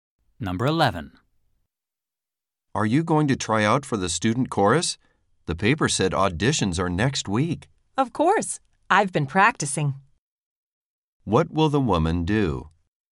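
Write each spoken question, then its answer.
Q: What will the woman do?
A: Audition for the student chorus.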